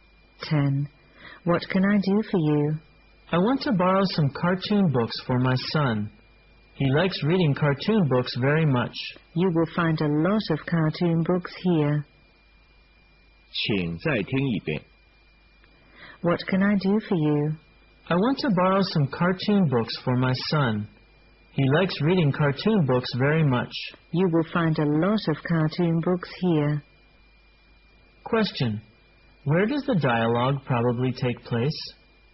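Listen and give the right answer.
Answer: In a library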